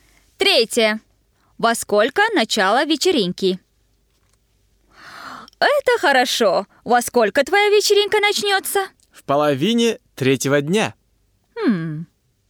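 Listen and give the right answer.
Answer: В половине третьего дня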